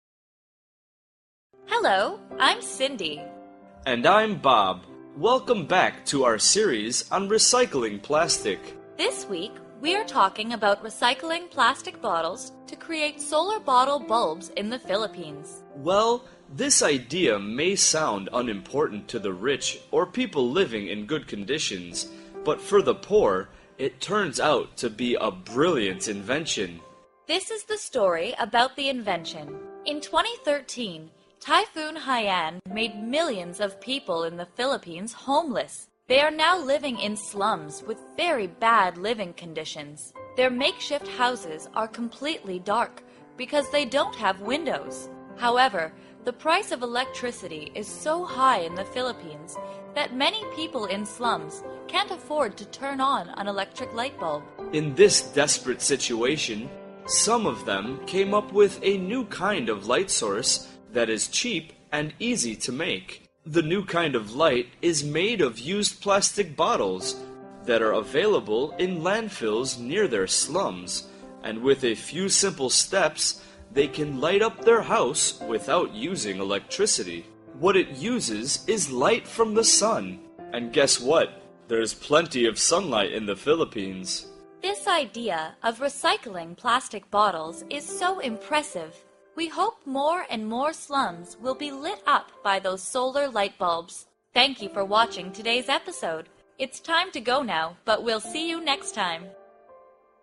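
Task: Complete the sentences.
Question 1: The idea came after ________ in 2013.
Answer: Typhoon Haiyan

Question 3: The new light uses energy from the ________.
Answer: sun

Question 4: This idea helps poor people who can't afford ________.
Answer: electricity

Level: lớp 8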